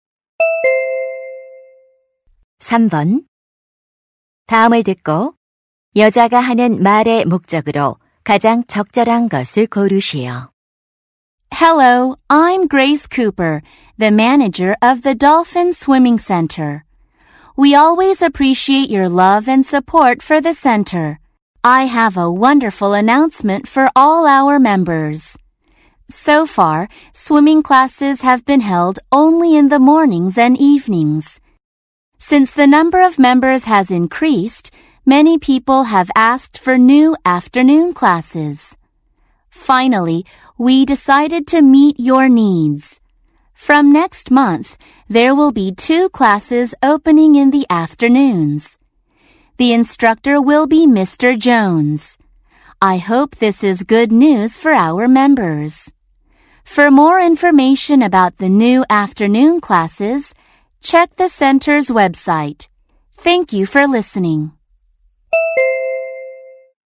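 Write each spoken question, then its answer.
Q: 다음을 듣고 여자가 하는 말의 목적으로 가장 적절한 것을 고르시오.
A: 오후 수영 강좌 신설을 안내하려고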